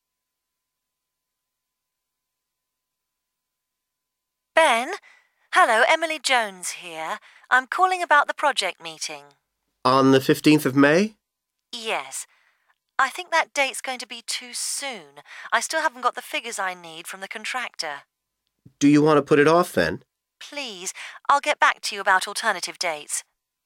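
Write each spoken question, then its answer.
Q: What does the woman want to do about the meeting?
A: Postpone it to a later date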